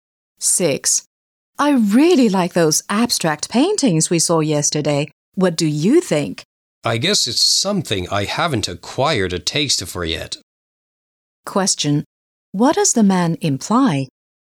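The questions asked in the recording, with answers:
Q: What does the man imply?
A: He doesn't appreciate abstract paintings yet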